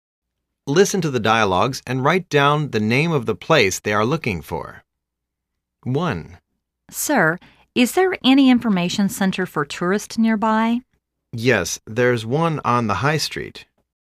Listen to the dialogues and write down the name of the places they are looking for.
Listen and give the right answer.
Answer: Tonrist informatio Centre

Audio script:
Listen to the dialogues and write down the name of the place they are looking for.
A:Sir, is there any information center for tourist nearby?
B:Yes, there's one on the high street.